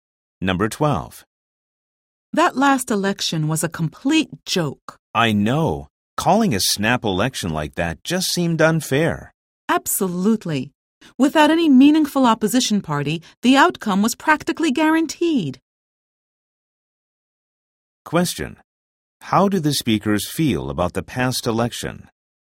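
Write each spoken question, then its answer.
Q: How do the speakers feel about the past election?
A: It was unfair and the outcome was practically guaranteed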